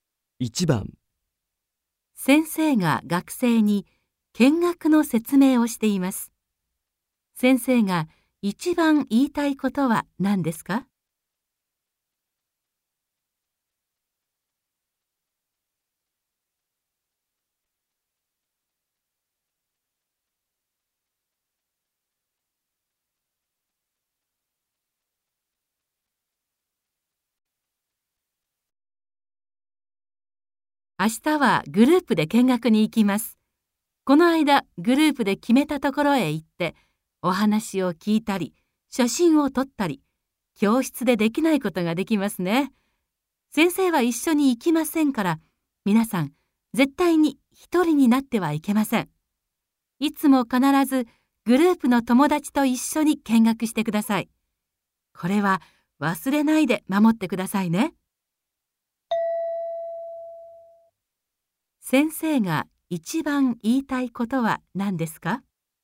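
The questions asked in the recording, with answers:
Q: 先生が一番言いたいことは何ですか?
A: 一人にならず、いつも必ずグループの友達と一緒に見学すること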